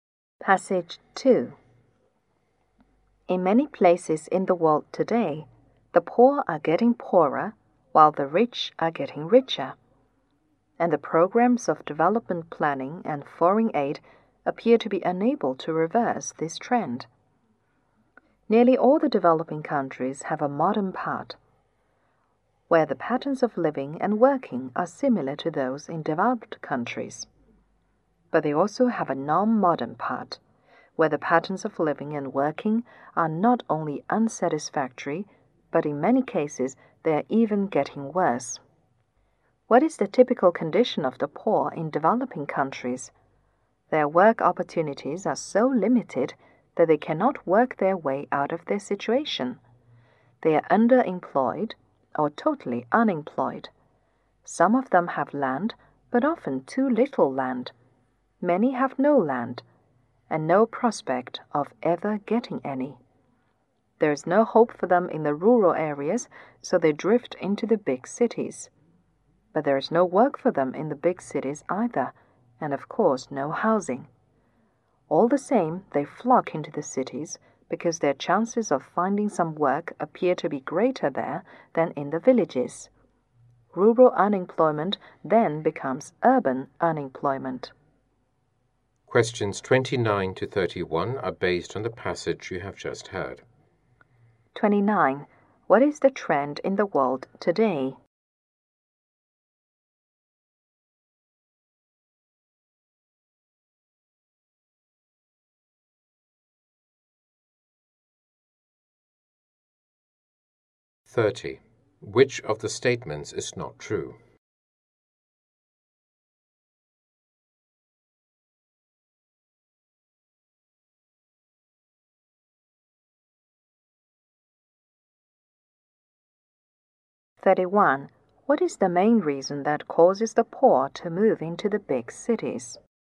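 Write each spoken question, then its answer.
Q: What is the trend in the world today?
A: The poor are getting poorer while the rich are getting richer

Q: What is the main reason that causes the poor to move into the big cities?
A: Their chances of finding work appear greater there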